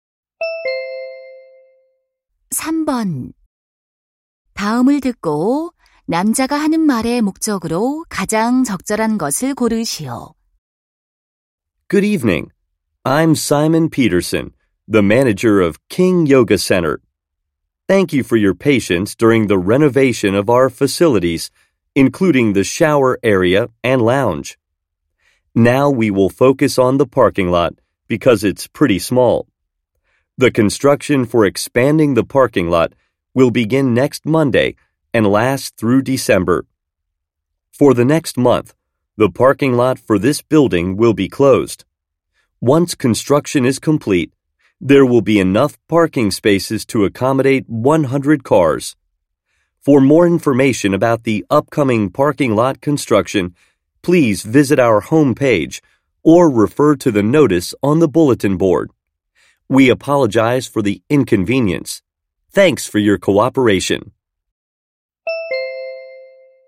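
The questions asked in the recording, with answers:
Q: 다음을 듣고 남자가 하는 말의 목적으로 가장 적절한 것을 고르시오.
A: 주차장 확장 공사를 안내하려고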